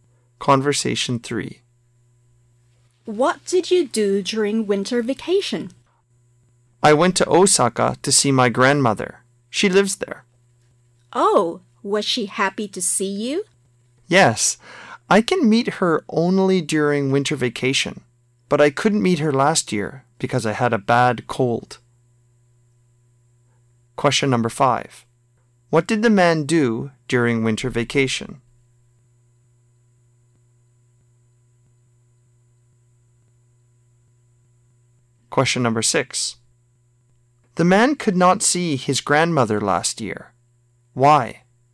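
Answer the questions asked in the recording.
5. He went to Osaka to see his grandmother
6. Because he had a bad cold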